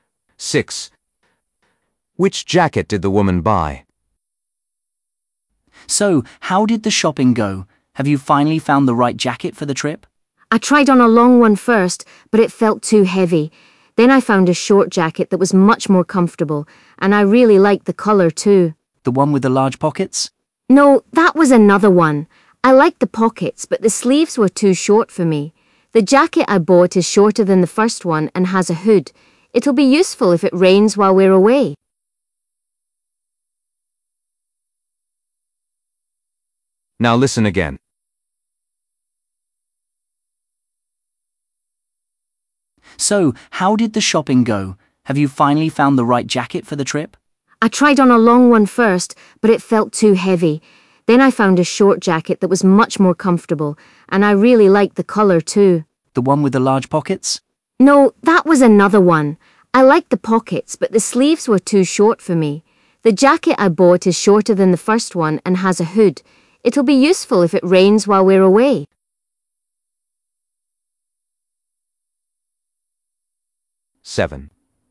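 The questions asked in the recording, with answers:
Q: Which jacket did the woman buy?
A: a short jacket with a hood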